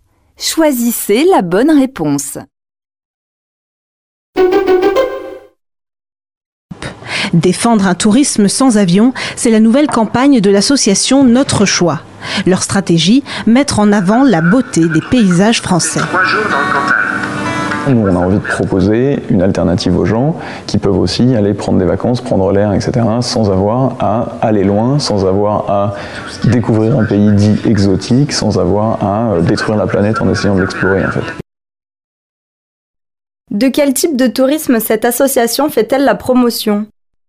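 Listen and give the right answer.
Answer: Un tourisme sans avion, local, en France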